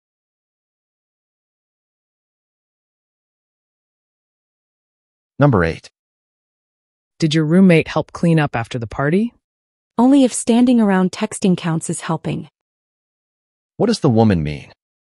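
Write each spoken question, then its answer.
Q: What does the woman mean?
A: Her roommate didn't really help; he just stood around texting.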